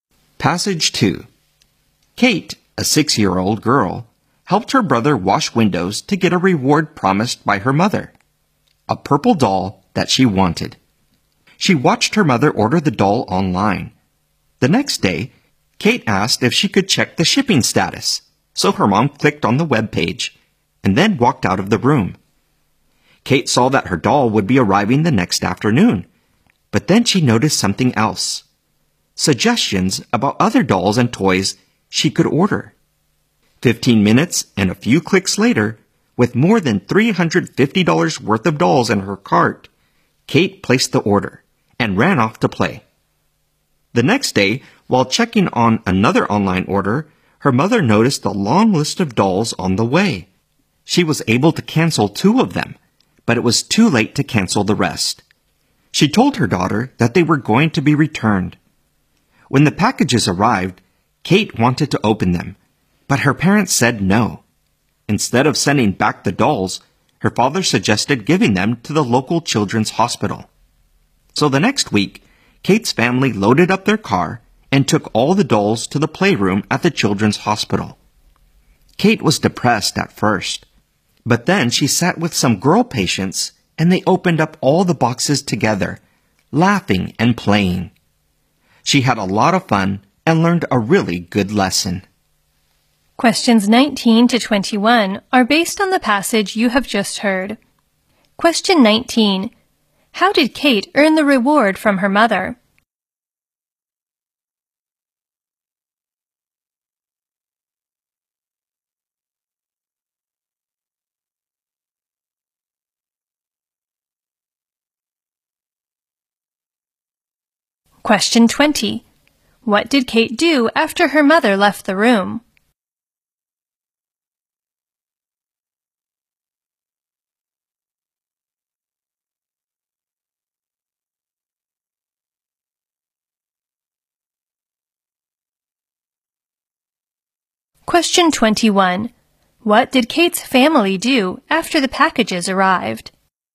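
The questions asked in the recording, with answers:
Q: How did Kate earn the reward from her mother?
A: By helping her brother wash windows

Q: What did Kate do after her mother left the room?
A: She ordered more than $350 worth of dolls

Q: What did Kate's family do after the packages arrived?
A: They gave the dolls to the local children's hospital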